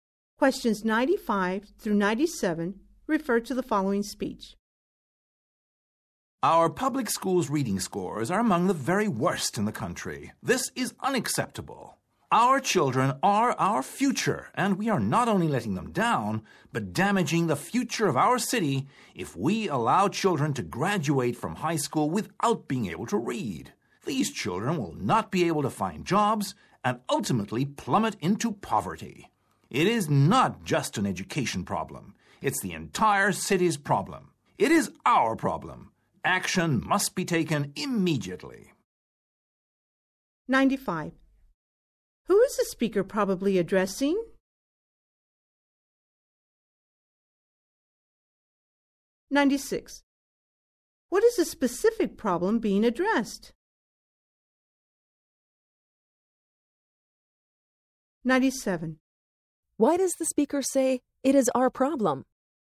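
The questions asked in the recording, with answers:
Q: What is the specific problem being addressed?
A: Poor reading scores in public schools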